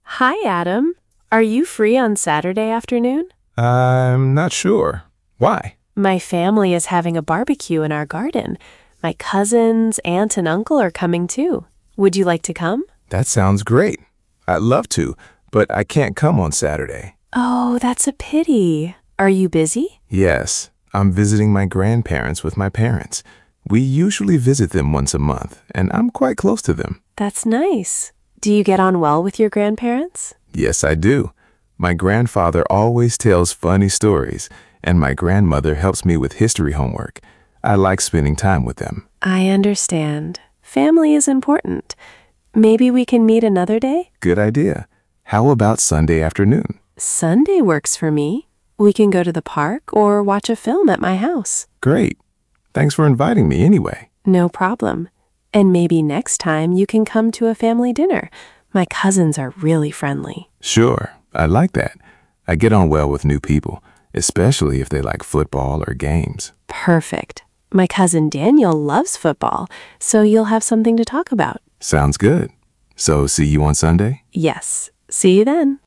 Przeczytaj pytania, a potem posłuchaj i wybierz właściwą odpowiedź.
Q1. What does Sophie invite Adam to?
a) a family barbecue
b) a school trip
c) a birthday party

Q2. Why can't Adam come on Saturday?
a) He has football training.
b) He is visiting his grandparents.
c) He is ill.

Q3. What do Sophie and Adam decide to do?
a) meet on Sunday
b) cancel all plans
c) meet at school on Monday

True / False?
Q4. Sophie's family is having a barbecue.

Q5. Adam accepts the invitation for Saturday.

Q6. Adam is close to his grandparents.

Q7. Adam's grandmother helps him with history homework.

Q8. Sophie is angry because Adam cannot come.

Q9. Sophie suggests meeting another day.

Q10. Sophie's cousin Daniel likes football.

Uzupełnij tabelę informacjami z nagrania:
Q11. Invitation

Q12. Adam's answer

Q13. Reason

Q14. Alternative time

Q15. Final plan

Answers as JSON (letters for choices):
{"1": "a", "2": "b", "3": "a", "4": "True", "5": "False", "6": "True", "7": "True", "8": "False", "9": "True", "10": "True", "11": "Sophie invites Adam to a family barbecue on Saturday.", "12": "He says he'd love to come, but he can't.", "13": "He is visiting his grandparents with his parents.", "14": "Sunday afternoon.", "15": "They will meet on Sunday and go to the park or watch a film."}

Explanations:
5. he says he can't come on Saturday.
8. she says "no problem" and suggests another day.

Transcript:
Sophie: Hi, Adam. Are you free on Saturday afternoon?
Adam: I'm not sure. Why?
Sophie: My family is having a barbecue in our garden. My cousins, aunt and uncle are coming too. Would you like to come?
Adam: That sounds great. I'd love to, but I can't come on Saturday.
Sophie: Oh, that's a pity. Are you busy?
Adam: Yes. I'm visiting my grandparents with my parents. We usually visit them once a month, and I'm quite close to them.
Sophie: That's nice. Do you get on well with your grandparents?
Adam: Yes, I do. My grandfather always tells funny stories, and my grandmother helps me with history homework. I like spending time with them.
Sophie: I understand. Family is important. Maybe we can meet another day?
Adam: Good idea. How about Sunday afternoon?
Sophie: Sunday works for me. We can go to the park or watch a film at my house.
Adam: Great. Thanks for inviting me anyway.
Sophie: No problem. And maybe next time you can come to a family dinner. My cousins are really friendly.
Adam: Sure. I'd like that. I get on well with new people, especially if they like football or games.
Sophie: Perfect. My cousin Daniel loves football, so you'll have something to talk about.
Adam: Sounds good. So, see you on Sunday?
Sophie: Yes, see you then!

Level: A2+/B1